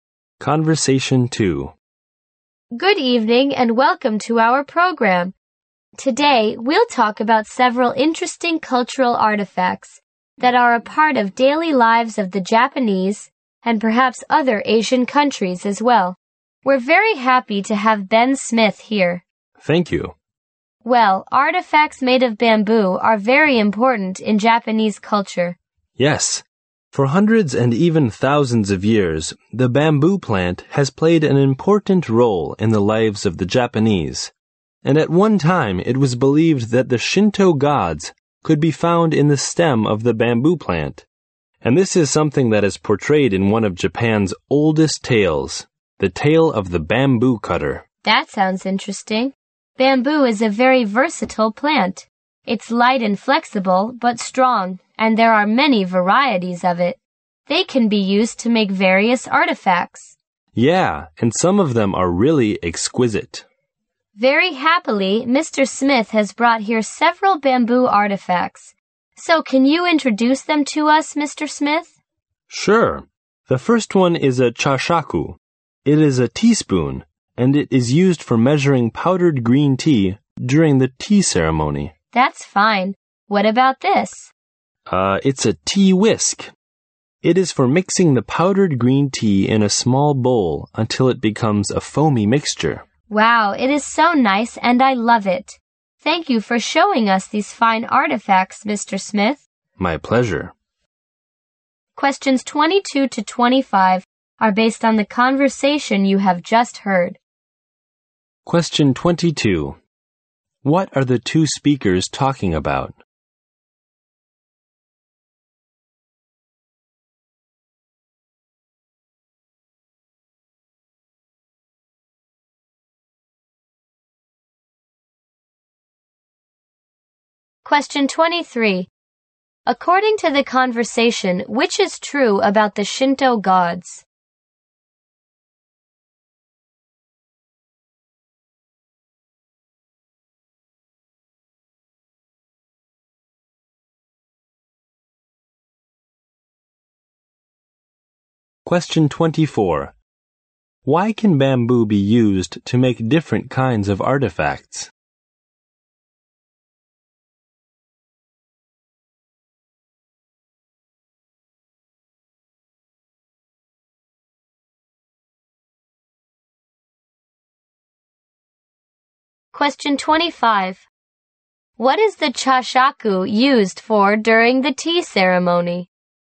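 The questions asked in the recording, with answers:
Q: What are the two speakers talking about?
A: Bamboo artifacts in Japanese culture

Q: According to the conversation, which is true about the Shinto gods?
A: They were once believed to be found in the stem of the bamboo plant

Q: Why can bamboo be used to make different kinds of artifacts?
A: It is light, flexible and strong, and has many varieties

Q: What is the chashaku used for during the tea ceremony?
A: Measuring powdered green tea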